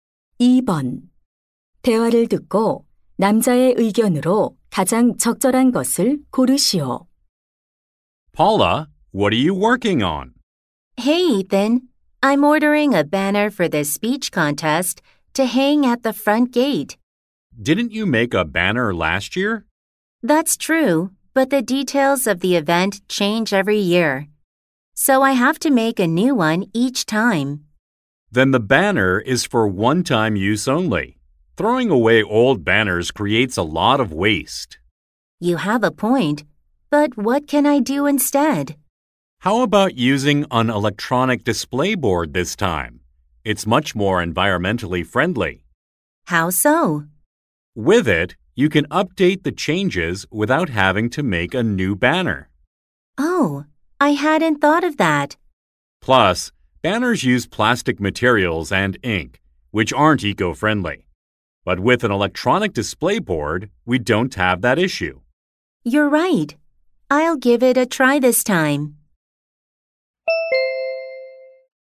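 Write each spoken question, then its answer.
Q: 대화를 듣고 남자의 의견으로 가장 적절한 것을 고르시오.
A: 일회용 현수막 대신 친환경적인 전자 게시판을 사용해야 한다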